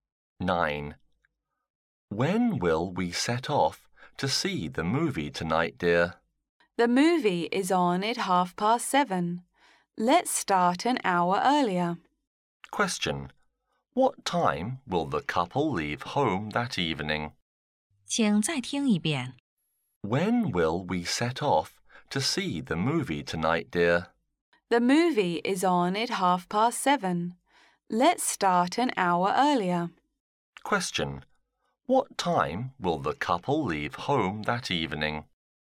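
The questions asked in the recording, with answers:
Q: What time will the couple leave home that evening?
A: At 6:30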